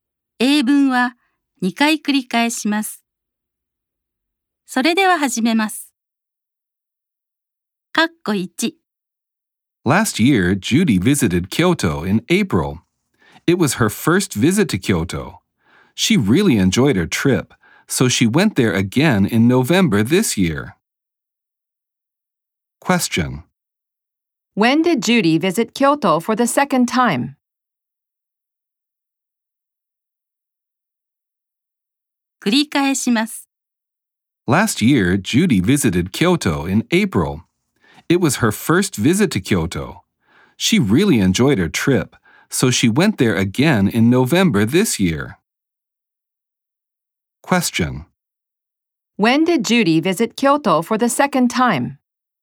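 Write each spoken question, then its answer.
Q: When did Judy visit Kyoto for the second time?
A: 今年の11月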